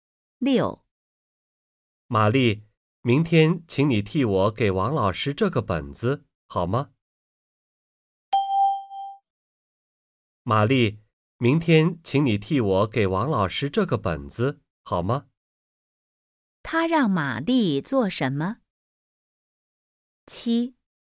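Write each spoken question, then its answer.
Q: 他让玛丽做什么?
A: 替他给王老师这个本子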